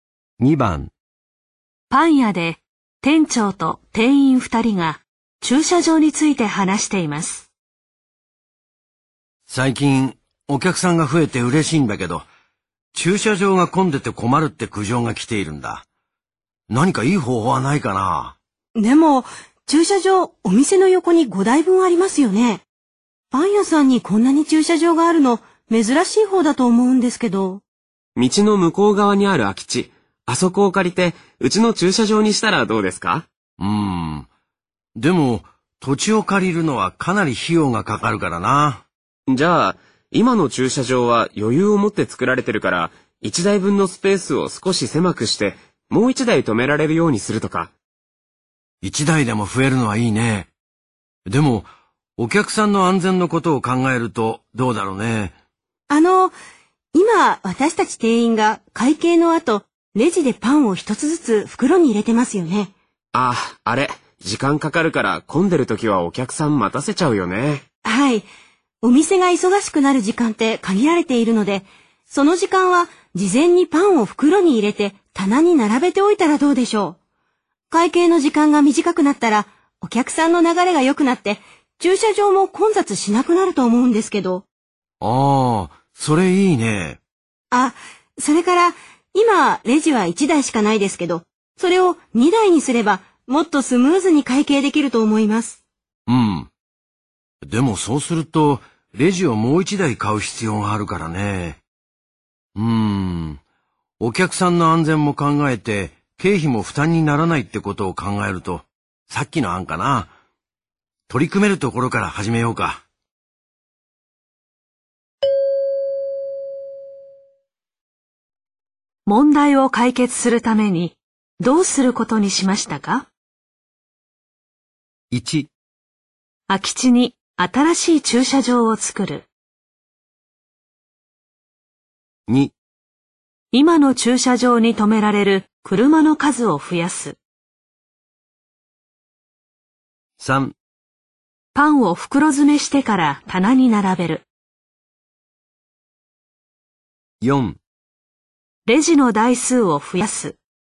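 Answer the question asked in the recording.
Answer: 3: パンを袋詰めしてから棚に並べる。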